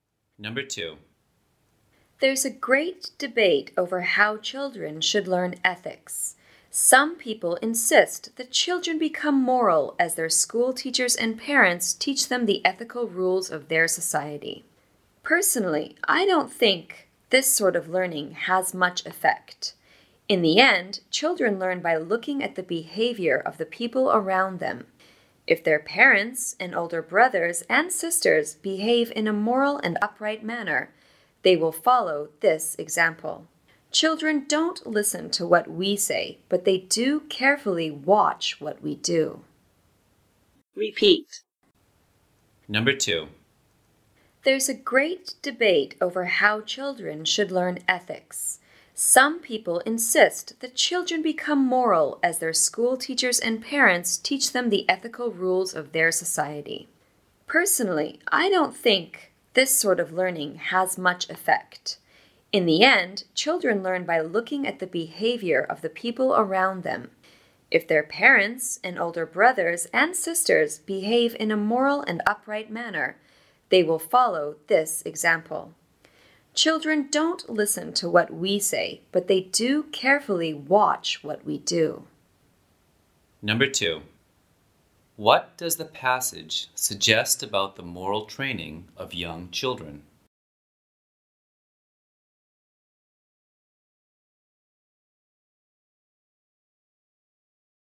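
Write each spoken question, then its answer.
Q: What does the passage suggest about the moral training of young children?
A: Children learn morals by copying the behavior of people around them, not from being taught rules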